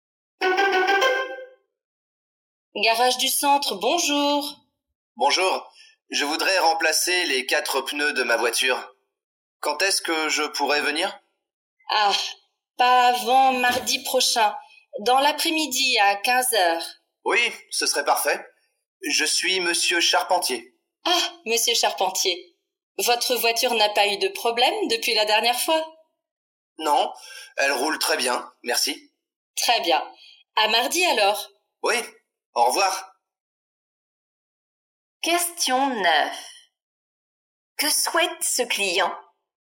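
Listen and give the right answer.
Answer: Faire remplacer les 4 pneus de sa voiture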